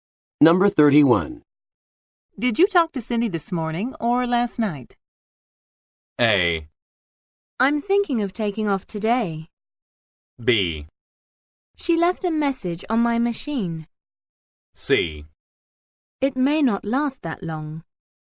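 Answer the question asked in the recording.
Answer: B: She left a message on my machine.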